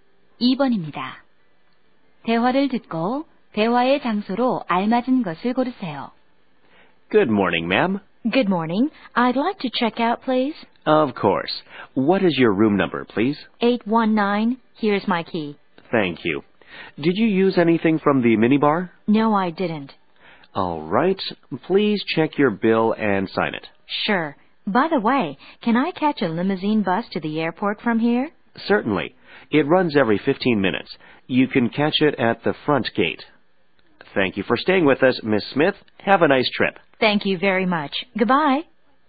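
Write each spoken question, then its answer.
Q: 대화를 듣고 대화의 장소로 알맞은 것을 고르세요.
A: 호텔 프런트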